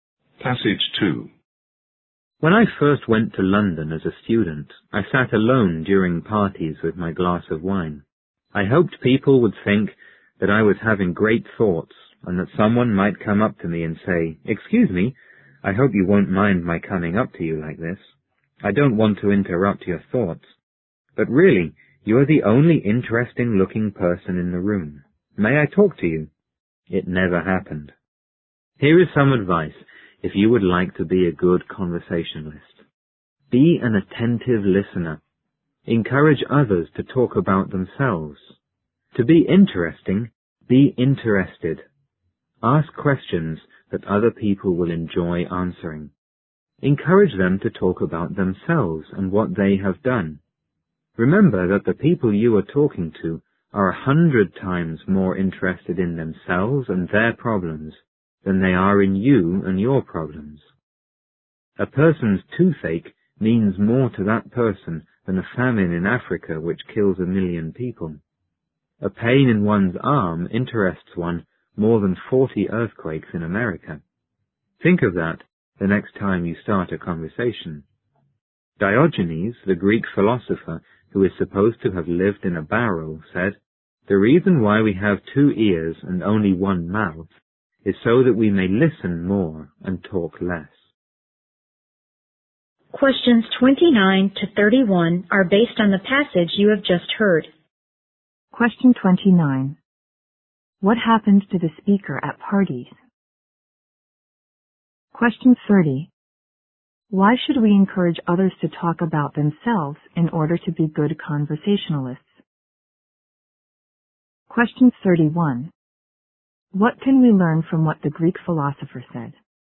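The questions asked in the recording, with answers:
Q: What happened to the speaker at parties?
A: He sat alone with a glass of wine and nobody came up to talk to him

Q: Why should we encourage others to talk about themselves in order to be good conversationalists?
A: People are far more interested in themselves and their own problems than in yours

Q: What can we learn from what the Greek philosopher said?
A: We should listen more and talk less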